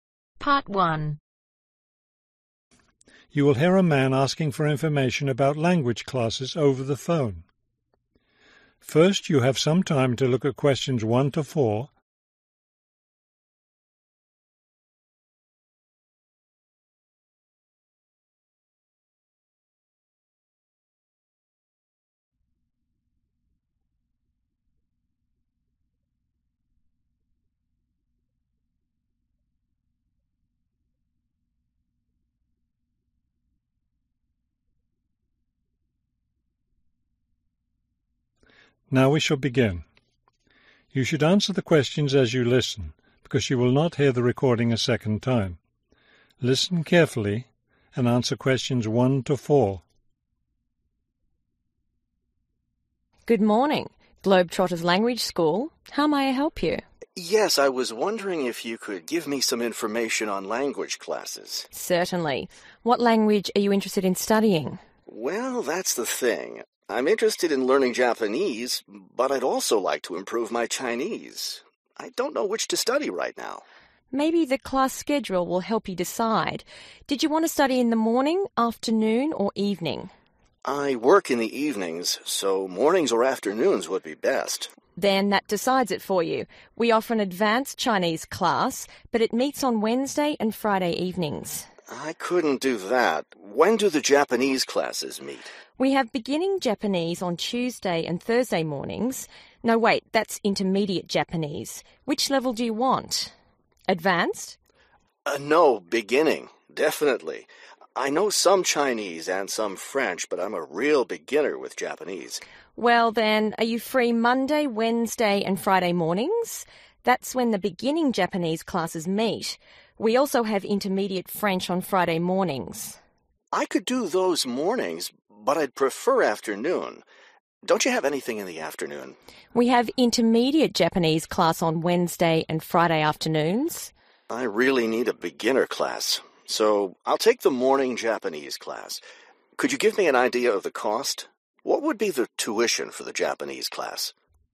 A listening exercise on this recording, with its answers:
Complete the schedule below.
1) Days: Wednesday and (1)............. evenings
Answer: Friday

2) Level: (2)............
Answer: Intermediate

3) Level: (3).............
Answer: Beginning

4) Days: Friday (4)............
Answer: Mornings